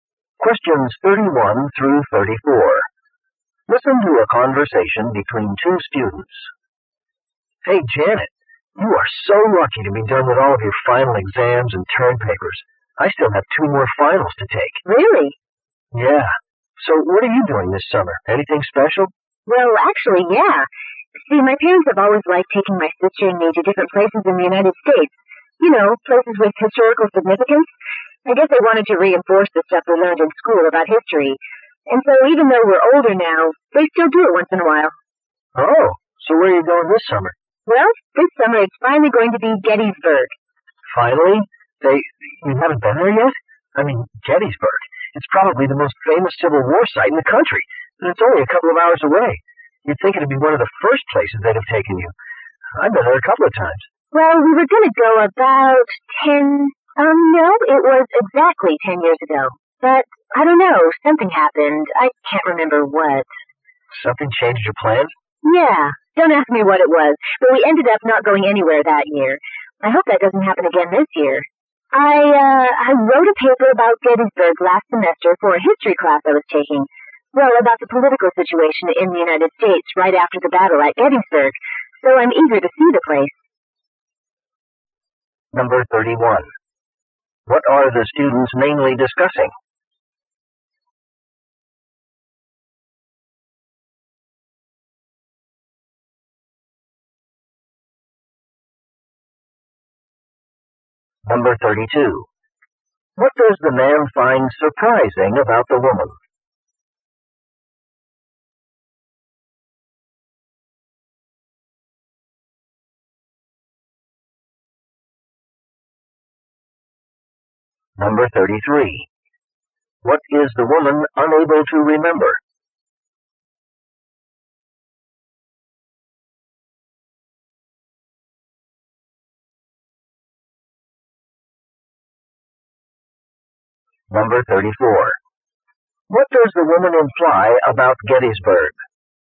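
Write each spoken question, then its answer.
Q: What are the students mainly discussing?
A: The woman's summer trip to Gettysburg.

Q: What does the man find surprising about the woman?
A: She has never been to Gettysburg.

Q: What is the woman unable to remember?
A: Why her family's trip to Gettysburg 10 years ago was canceled.

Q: What does the woman imply about Gettysburg?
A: She wants to see it because she wrote a paper about it.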